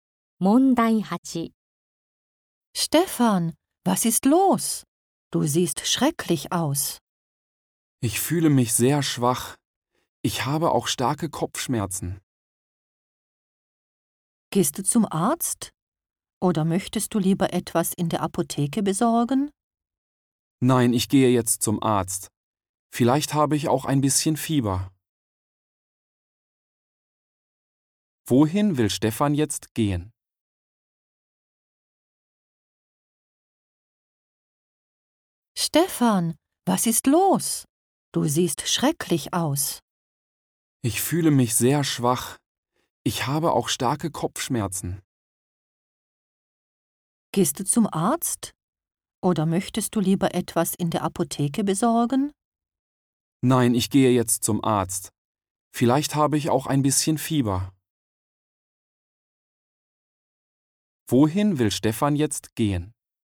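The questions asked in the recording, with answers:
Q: Wohin will Stefan jetzt gehen?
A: Zum Arzt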